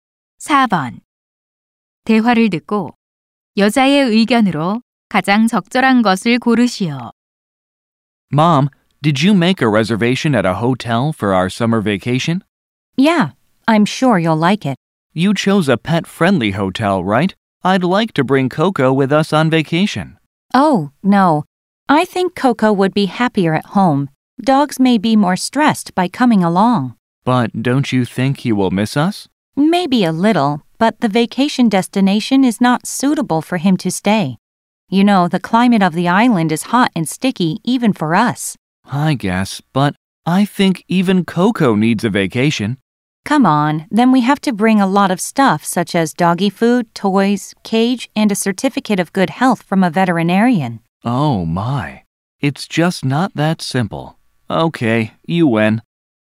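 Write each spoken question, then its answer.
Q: 대화를 듣고 여자의 의견으로 가장 적절한 것을 고르시오.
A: 반려견은 휴가에 데려가지 않고 집에 두는 것이 더 낫다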